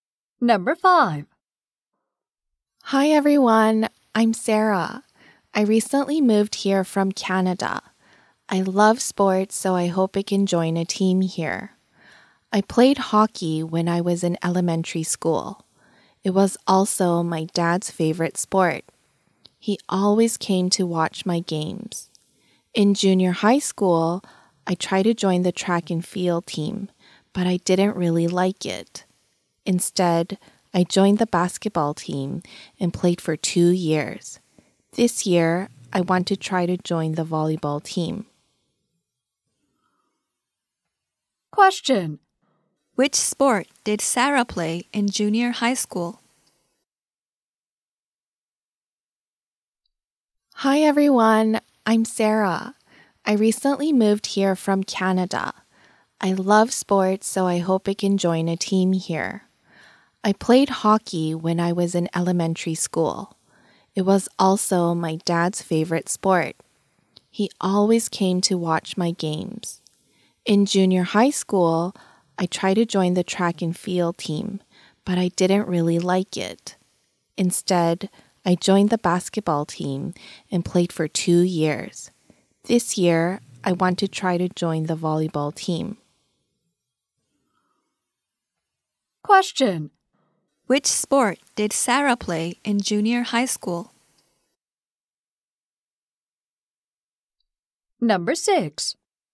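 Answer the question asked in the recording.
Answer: Basketball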